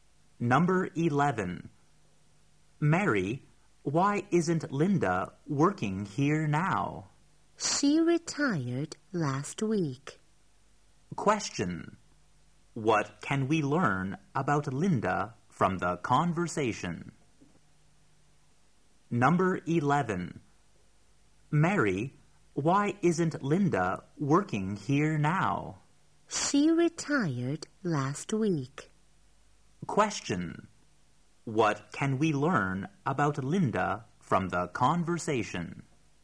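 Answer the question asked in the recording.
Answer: She retired last week.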